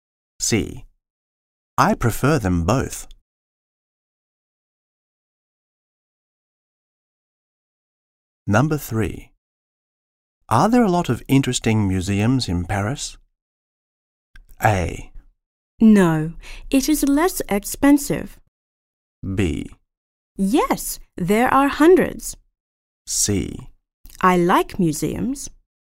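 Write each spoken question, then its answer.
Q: Are there a lot of interesting museums in Paris?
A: B: Yes, there are hundreds.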